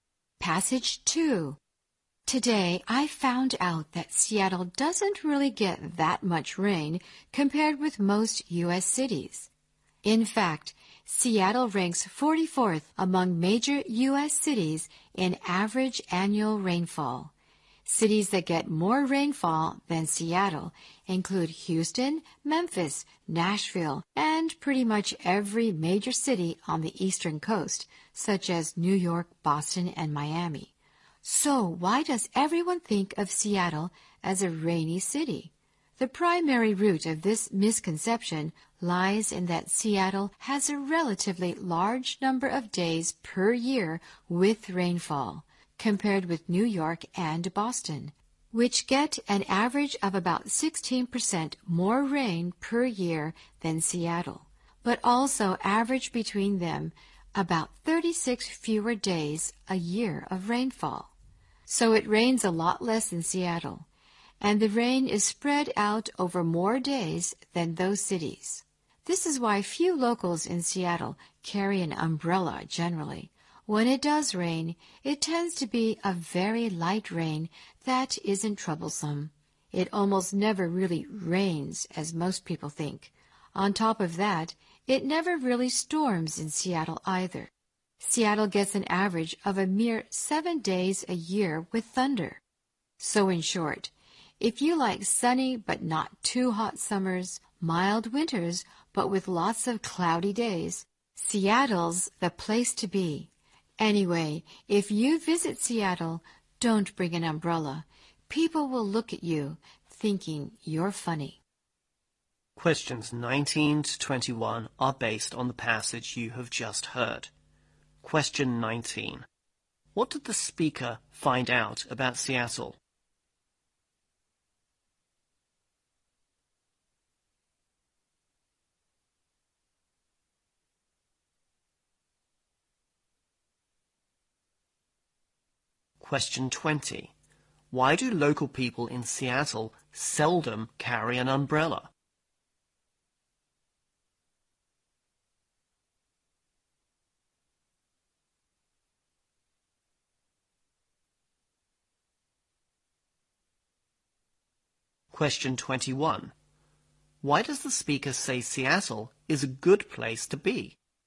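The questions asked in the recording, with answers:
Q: What did the speaker find out about Seattle?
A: It doesn't get much rain compared with most U.S. cities

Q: Why do local people in Seattle seldom carry an umbrella?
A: The rain is usually very light

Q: Why does the speaker say Seattle is a good place to be?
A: Sunny but not too hot summers and mild winters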